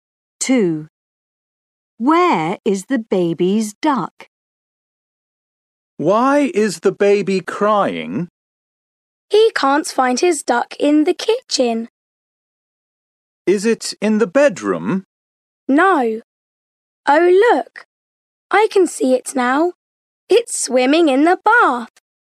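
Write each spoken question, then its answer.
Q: Where is the baby's duck?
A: In the bath.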